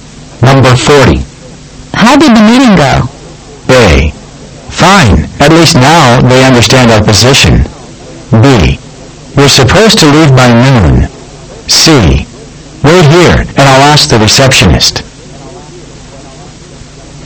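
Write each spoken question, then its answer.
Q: How did the meeting go?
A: A: Fine, at least now they understand our position.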